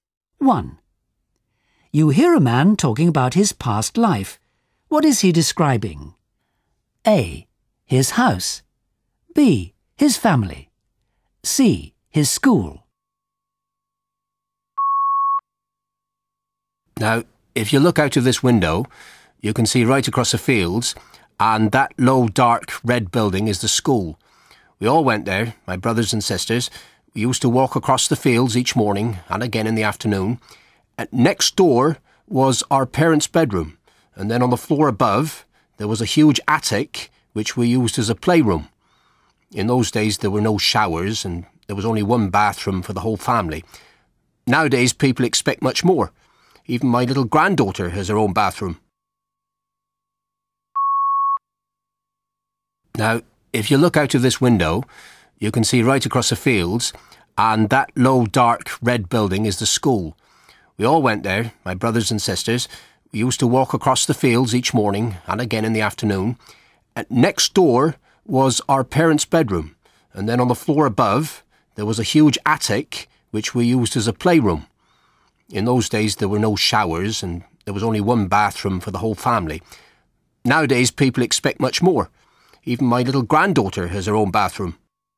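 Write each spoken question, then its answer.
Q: What is he describing? A. His house. B. His family. C. His school.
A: A: His house.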